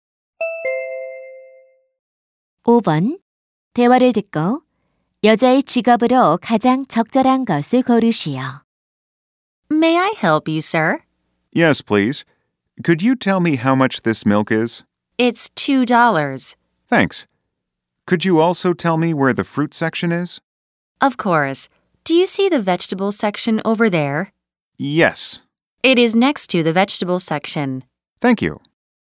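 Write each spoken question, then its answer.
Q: 대화를 듣고 여자의 직업으로 가장 적절한 것을 고르시오.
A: 마트 점원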